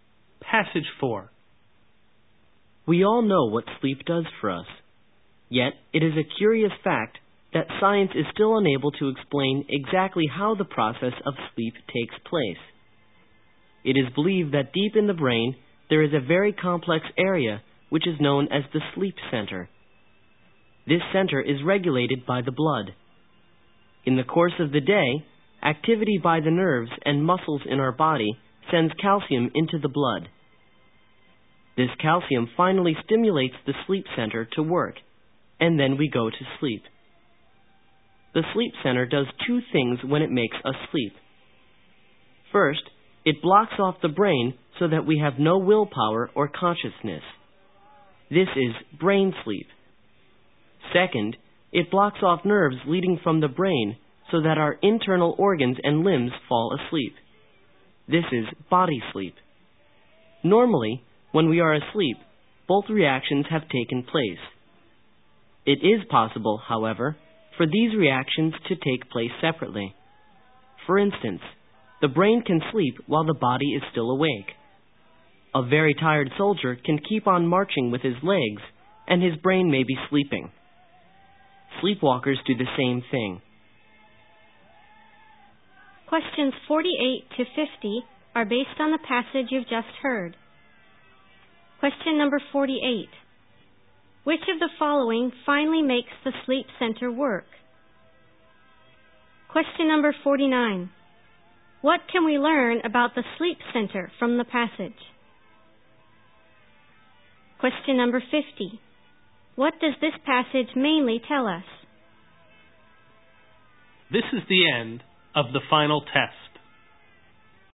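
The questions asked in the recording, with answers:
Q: Which of the following finally makes the sleep center work?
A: Calcium in the blood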